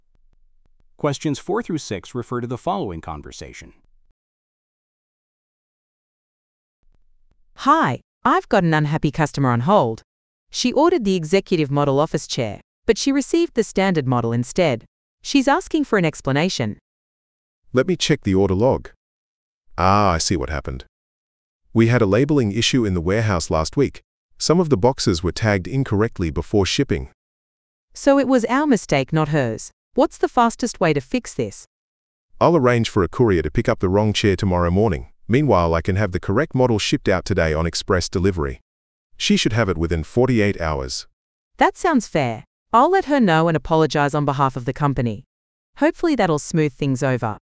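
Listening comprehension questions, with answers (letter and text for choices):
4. What problem are the speakers discussing?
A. A delayed payment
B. A damaged product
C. A missing invoice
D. An incorrect delivery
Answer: D. An incorrect delivery

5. What caused the problem?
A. A system error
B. Incorrect labeling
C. A shipping delay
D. Customer confusion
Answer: B. Incorrect labeling

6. How will the company address the customer's issue?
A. Offering a discount on the next order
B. Providing a full refund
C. Sending the correct item quickly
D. Replacing the item at no charge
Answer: C. Sending the correct item quickly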